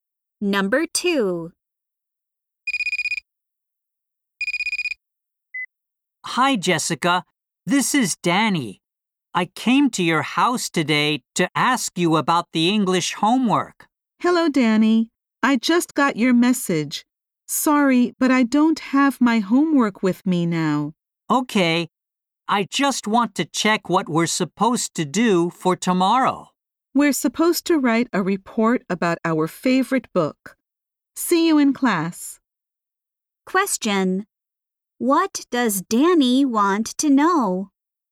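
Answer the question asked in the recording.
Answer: What the English homework for tomorrow is.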